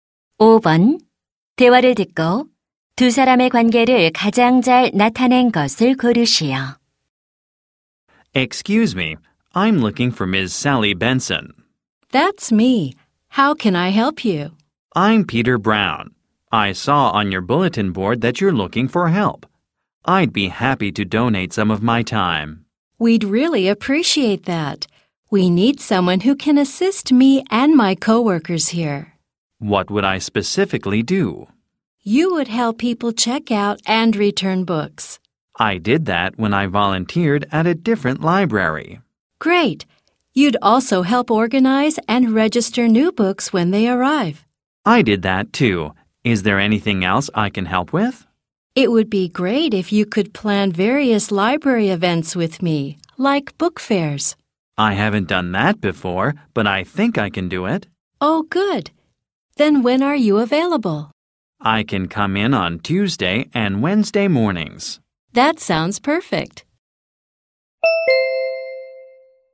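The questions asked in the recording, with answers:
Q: 대화를 듣고 두 사람의 관계를 가장 잘 나타낸 것을 고르시오.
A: 도서관 사서와 자원봉사 지원자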